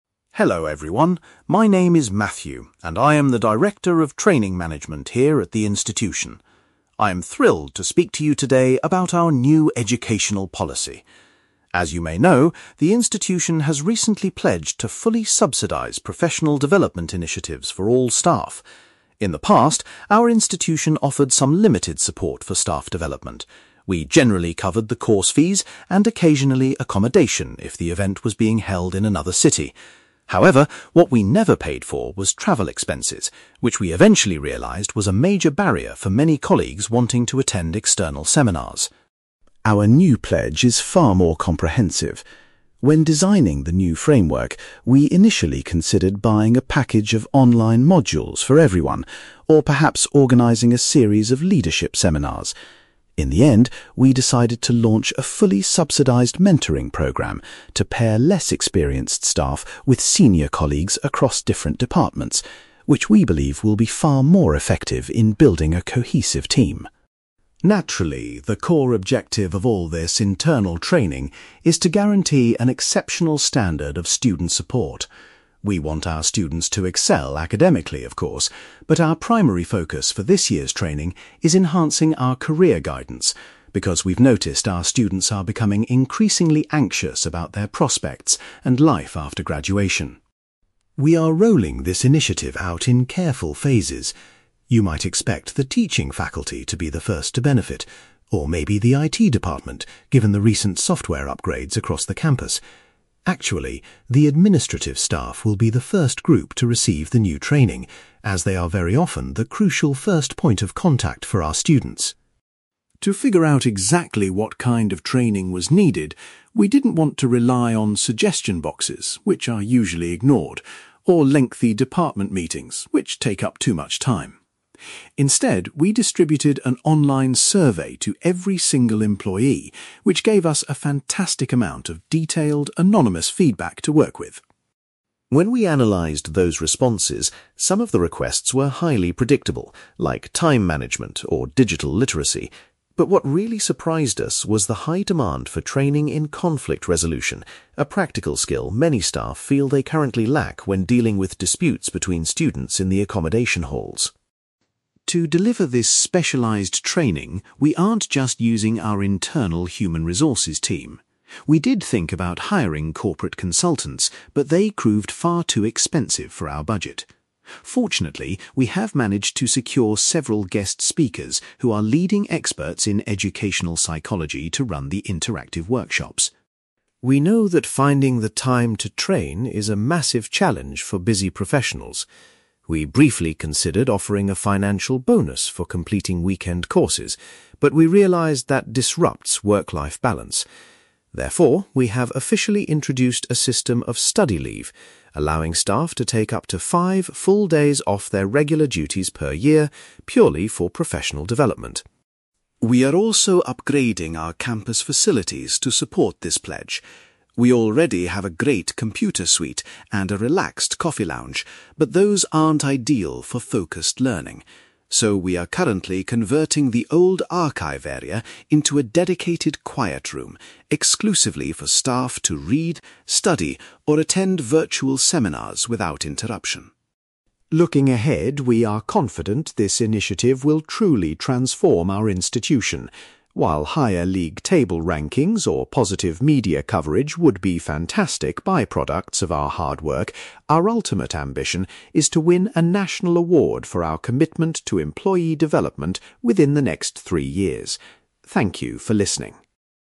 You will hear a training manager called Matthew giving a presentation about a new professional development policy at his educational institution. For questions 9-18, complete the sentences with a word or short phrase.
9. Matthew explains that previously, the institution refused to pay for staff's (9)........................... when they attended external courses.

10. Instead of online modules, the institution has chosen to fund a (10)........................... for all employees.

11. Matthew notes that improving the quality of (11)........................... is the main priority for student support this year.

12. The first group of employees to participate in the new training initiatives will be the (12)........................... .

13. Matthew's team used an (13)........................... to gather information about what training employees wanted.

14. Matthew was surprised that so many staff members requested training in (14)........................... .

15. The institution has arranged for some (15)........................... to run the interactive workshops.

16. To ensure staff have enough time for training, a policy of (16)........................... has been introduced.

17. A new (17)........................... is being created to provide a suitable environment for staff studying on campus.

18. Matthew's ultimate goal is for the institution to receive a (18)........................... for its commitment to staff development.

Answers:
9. travel expenses
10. mentoring program
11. career guidance
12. administrative staff
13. online survey
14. conflict resolution
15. guest speakers
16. study leave
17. quiet room
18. national award

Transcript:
Matthew: Hello everyone, my name is Matthew, and I am the Director of Training Management here at the institution. I am thrilled to speak to you today about our new educational policy. As you may know, the institution has recently pledged to fully subsidize professional development initiatives for all staff. In the past, our institution offered some limited support for staff development. We generally covered the course fees, and occasionally accommodation if the event was being held in another city. However, what we never paid for was travel expenses, which we eventually realized was a major barrier for many colleagues wanting to attend external seminars.
Our new pledge is far more comprehensive. When designing the new framework, we initially considered buying a package of online modules for everyone, or perhaps organizing a series of leadership seminars. In the end, we decided to launch a fully subsidized mentoring program to pair less experienced staff with senior colleagues across different departments, which we believe will be far more effective in building a cohesive team.
Naturally, the core objective of all this internal training is to guarantee an exceptional standard of student support. We want our students to excel academically, of course, but our primary focus for this year's training is enhancing our career guidance, because we've noticed our students are becoming increasingly anxious about their prospects and life after graduation.
We are rolling this initiative out in careful phases. You might expect the teaching faculty to be the first to benefit, or maybe the IT department given the recent software upgrades across the campus. Actually, the administrative staff will be the first group to receive the new training, as they are very often the crucial first point of contact for our students.
To figure out exactly what kind of training was needed, we didn't want to rely on suggestion boxes, which are usually ignored, or lengthy department meetings, which take up too much time. Instead, we distributed an online survey to every single employee, which gave us a fantastic amount of detailed, anonymous feedback to work with.
When we analyzed those responses, some of the requests were highly predictable, like time management or digital literacy. But what really surprised us was the high demand for training in conflict resolution, a practical skill many staff feel they currently lack when dealing with disputes between students in the accommodation halls.
To deliver this specialized training, we aren't just using our internal human resources team. We did think about hiring corporate consultants, but they proved far too expensive for our budget. Fortunately, we have managed to secure several guest speakers who are leading experts in educational psychology to run the interactive workshops.
We know that finding the time to train is a massive challenge for busy professionals. We briefly considered offering a financial bonus for completing weekend courses, but we realized that disrupts work-life balance. Therefore, we have officially introduced a system of study leave, allowing staff to take up to five full days off their regular duties per year purely for professional development.
We are also upgrading our campus facilities to support this pledge. We already have a great computer suite and a relaxed coffee lounge, but those aren't ideal for focused learning. So, we are currently converting the old archive area into a dedicated quiet room, exclusively for staff to read, study, or attend virtual seminars without interruption.
Looking ahead, we are confident this initiative will truly transform our institution. While higher league table rankings or positive media coverage would be fantastic by-products of our hard work, our ultimate ambition is to win a national award for our commitment to employee development within the next three years. Thank you for listening.

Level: B2